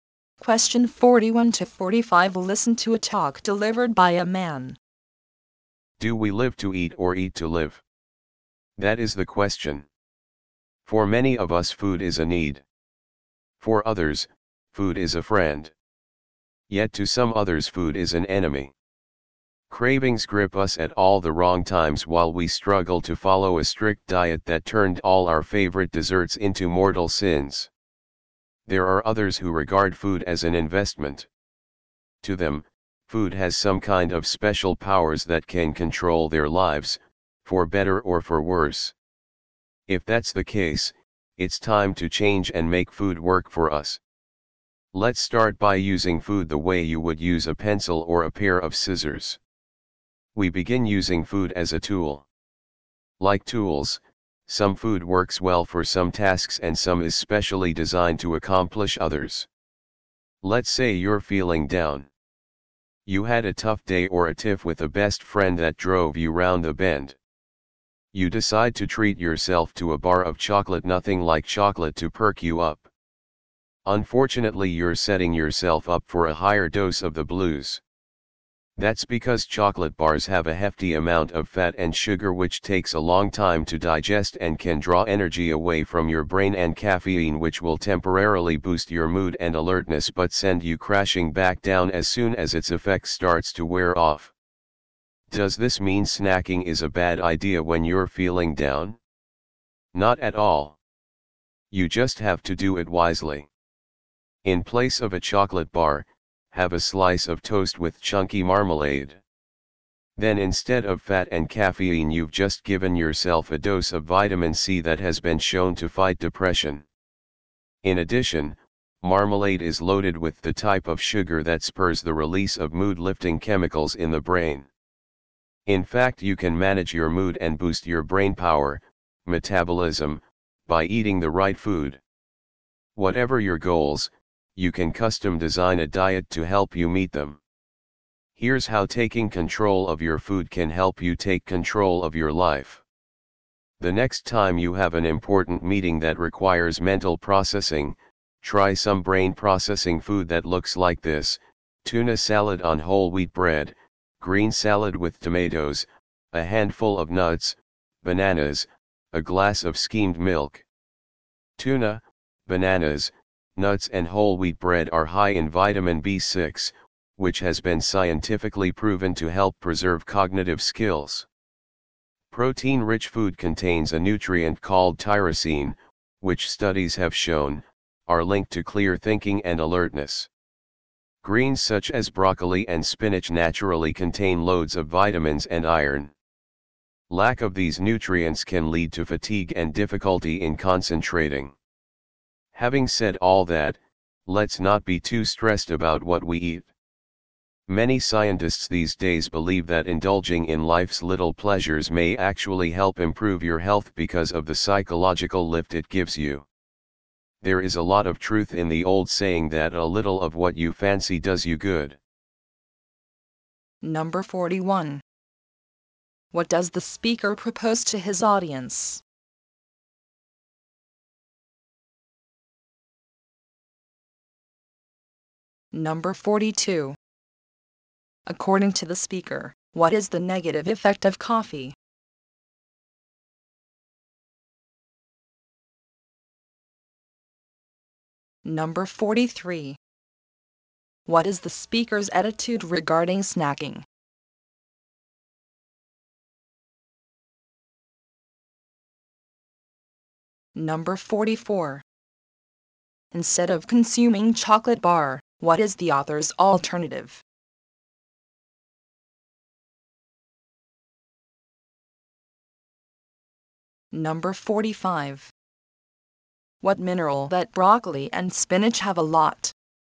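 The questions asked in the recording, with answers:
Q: What does the speaker propose to his audience?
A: To use food as a tool

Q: What is the speaker's attitude regarding snacking?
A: It is fine if done wisely

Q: Instead of consuming chocolate bar, what is the author's alternative?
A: A slice of toast with chunky marmalade

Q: What mineral that broccoli and spinach have a lot?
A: Iron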